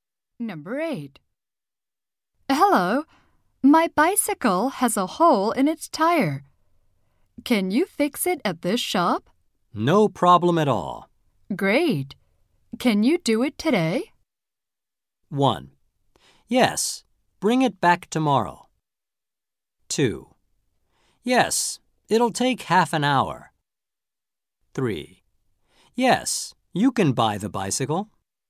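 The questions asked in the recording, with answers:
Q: Great. Can you do it today?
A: 2: Yes, it'll take half an hour.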